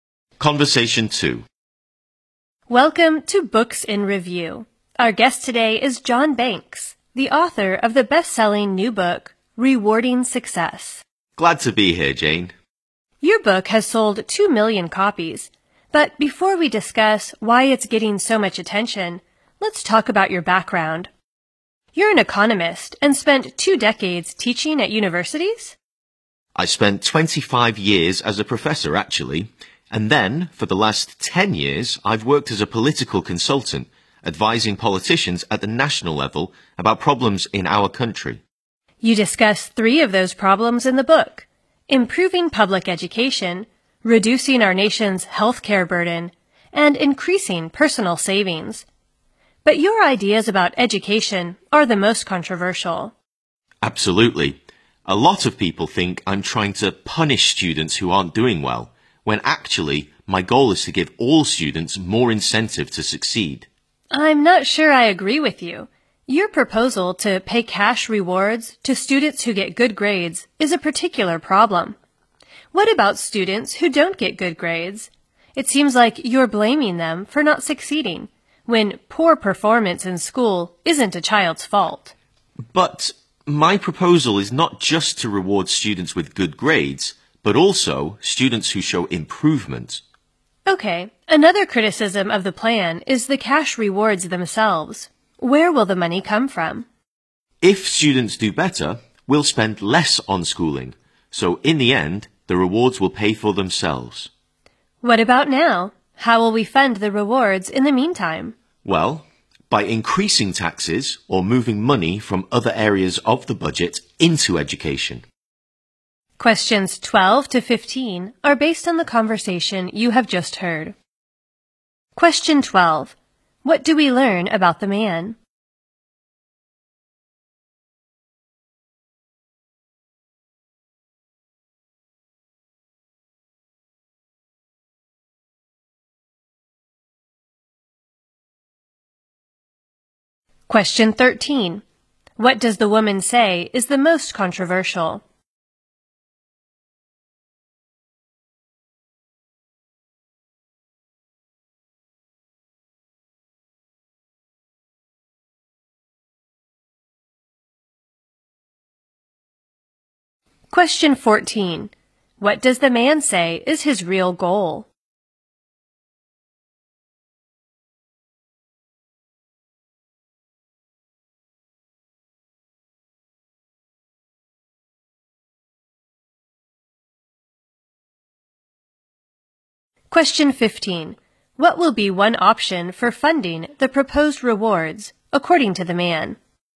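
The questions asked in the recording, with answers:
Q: What do we learn about the man?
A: He was a professor for 25 years and is now a political consultant

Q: What does the woman say is the most controversial?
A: His ideas about education

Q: What does the man say is his real goal?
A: To give all students more incentive to succeed

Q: What will be one option for funding the proposed rewards, according to the man?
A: Increasing taxes or moving money from other budget areas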